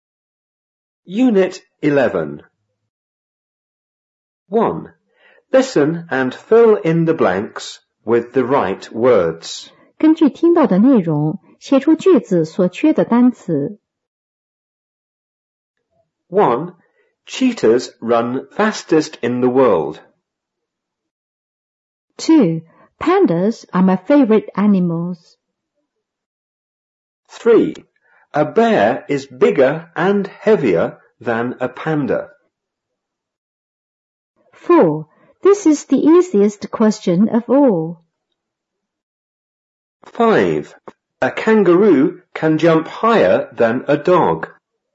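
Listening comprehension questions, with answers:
1.Listen and fill in the blanks with the right words.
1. Cheetahs are the____animals in the______.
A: fastest / world

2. ____are my favourite_____.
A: Pandas / animals

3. A bear is____and_____than a panda.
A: bigger / heavier

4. This is the____question of______.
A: easiest / all

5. A kangaroo can_____ ______than a dog.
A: jump higher

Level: 五年级下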